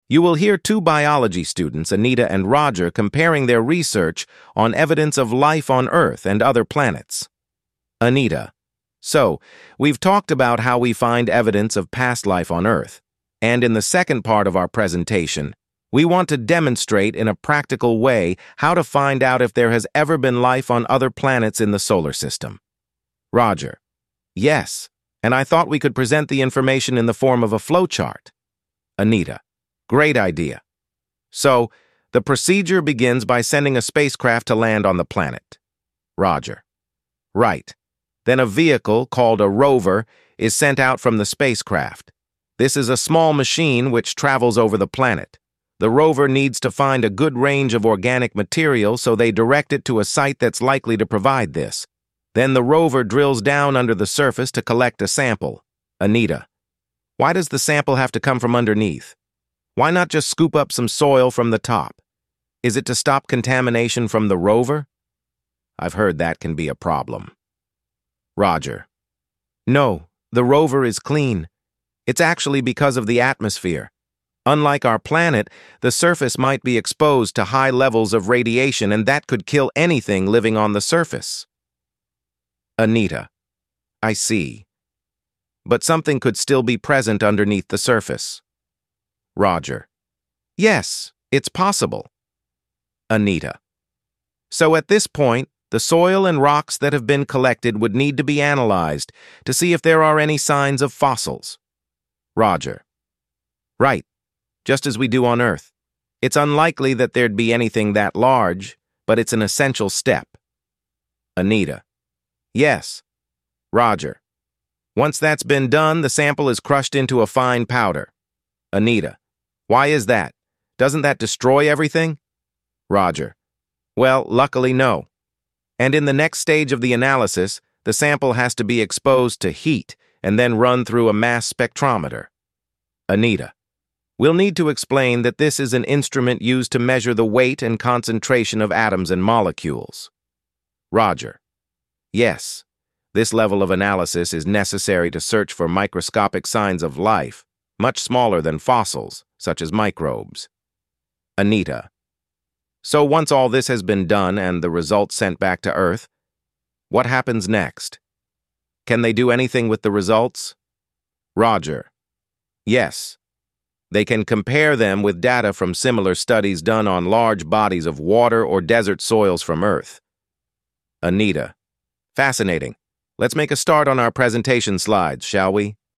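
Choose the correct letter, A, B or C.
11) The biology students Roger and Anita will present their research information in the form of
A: a flowchart

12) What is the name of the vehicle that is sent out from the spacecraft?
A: a rover

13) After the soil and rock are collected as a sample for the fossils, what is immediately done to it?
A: it is analysed for signs of fossils

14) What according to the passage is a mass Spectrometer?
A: an instrument to measure the weight and concentration of atoms and molecules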